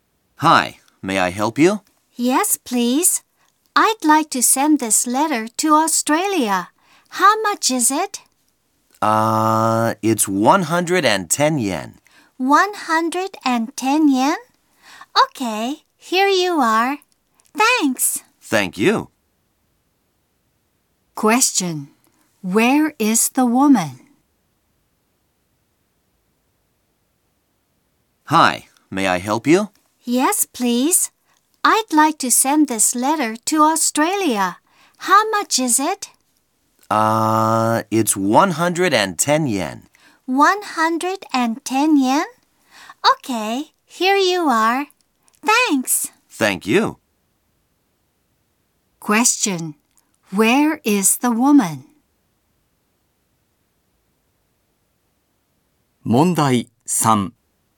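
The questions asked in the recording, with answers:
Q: Where is the woman?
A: At a post office.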